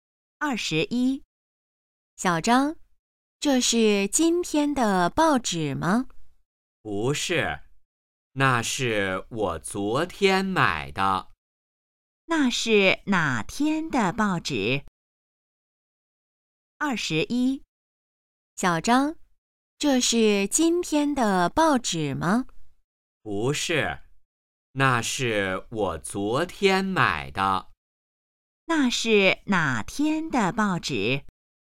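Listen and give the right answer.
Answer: 昨天的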